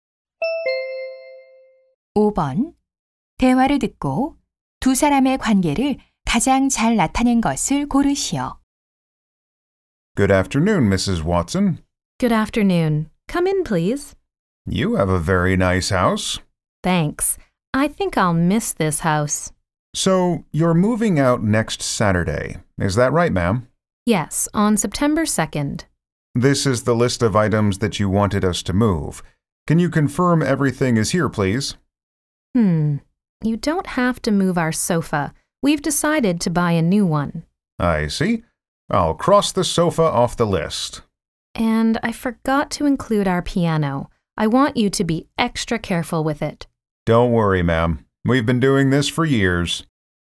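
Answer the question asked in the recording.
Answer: 이사업체 직원 - 고객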